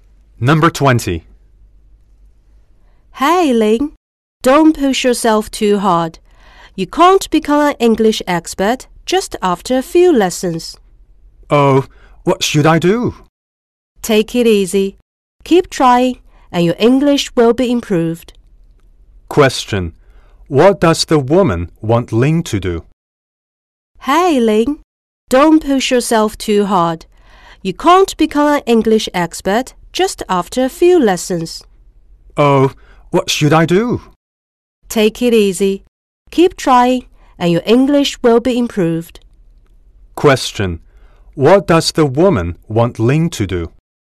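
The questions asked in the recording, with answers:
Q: What does the woman want Ling to do?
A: Take it easy and keep trying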